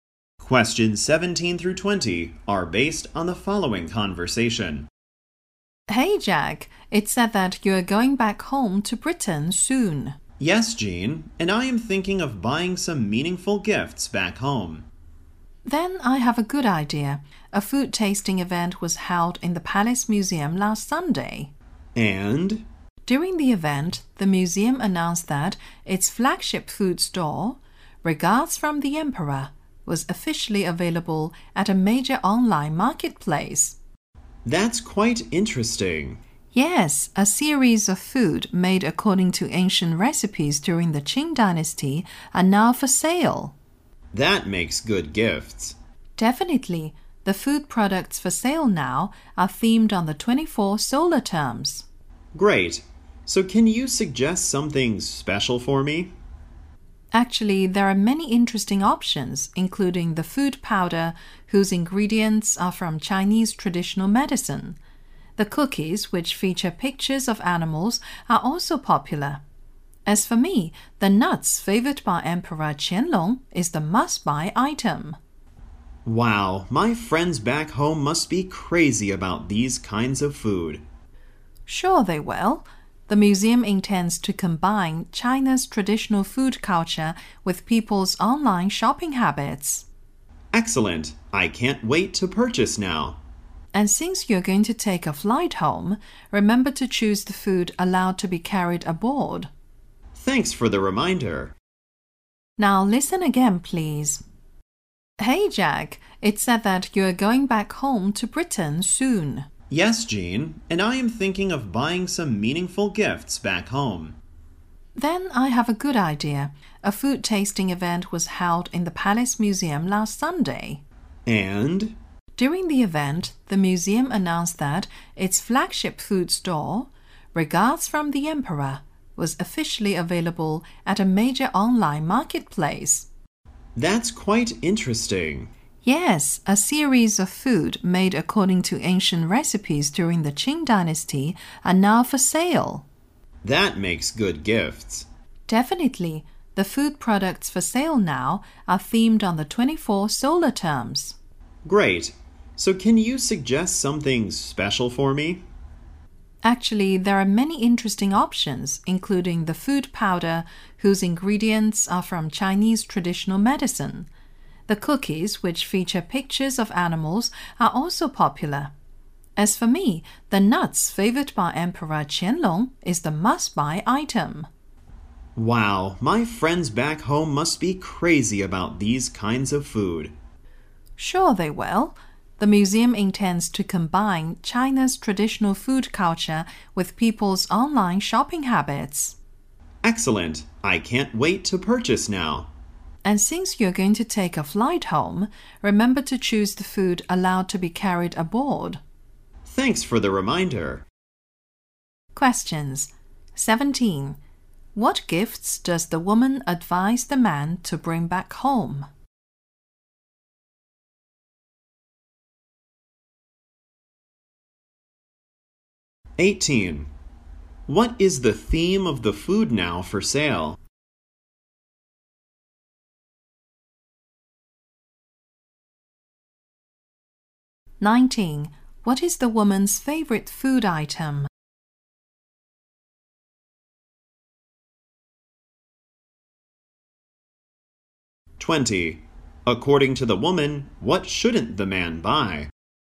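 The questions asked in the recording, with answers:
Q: What gifts does the woman advise the man to bring back home?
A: Food from the Palace Museum's online store, made from Qing Dynasty recipes

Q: What is the theme of the food now for sale?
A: The 24 solar terms

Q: What is the woman's favorite food item?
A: The nuts Emperor Qianlong liked

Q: According to the woman, what shouldn't the man buy?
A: Food that isn't allowed to be carried on the plane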